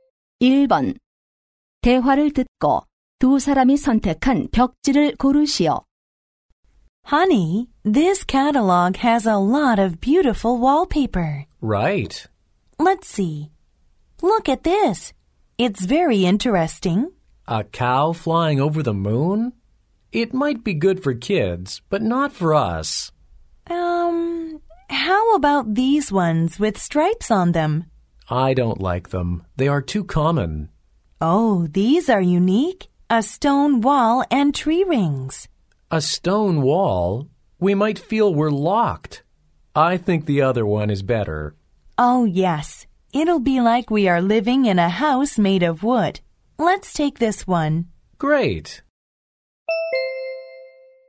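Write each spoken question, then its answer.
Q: 대화를 듣고 두 사람이 선택한 벽지를 고르시오.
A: 나이테(나무) 무늬 벽지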